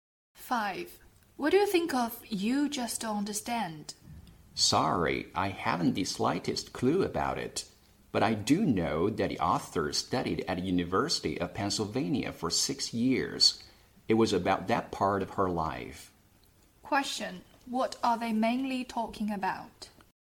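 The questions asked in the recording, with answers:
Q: What are they mainly talking about?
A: A book and its author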